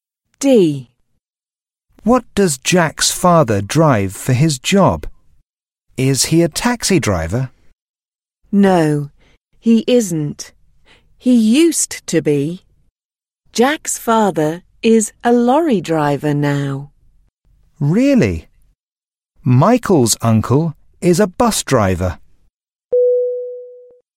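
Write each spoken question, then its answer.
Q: What does Jack's father drive for his job?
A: a lorry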